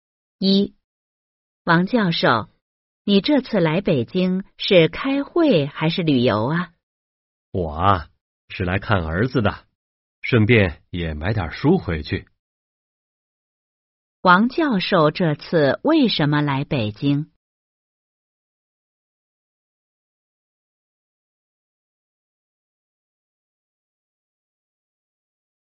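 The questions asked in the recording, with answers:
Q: 王教授这次为什么来北京?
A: 来看儿子(顺便买点书)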